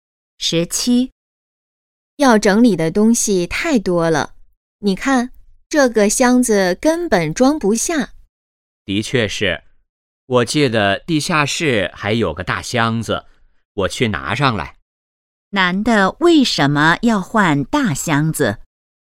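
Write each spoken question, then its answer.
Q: 男的为什么要换大箱子?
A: 东西太多,箱子装不下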